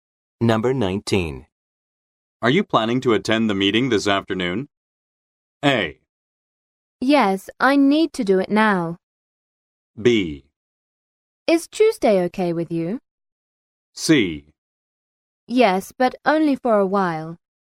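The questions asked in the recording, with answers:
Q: Are you planning to attend the meeting this afternoon?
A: C: Yes, but only for a while.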